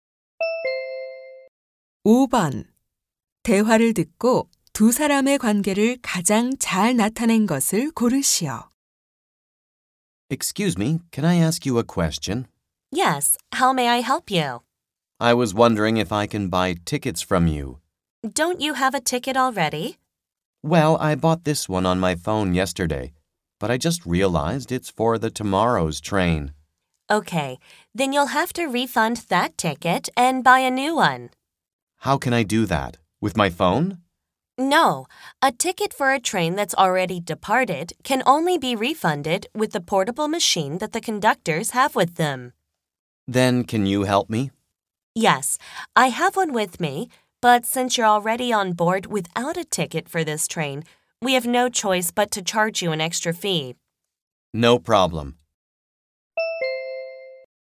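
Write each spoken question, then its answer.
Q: 대화를 듣고 두 사람의 관계를 가장 잘 나타낸 것을 고르시오.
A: 기차 승객 - 승무원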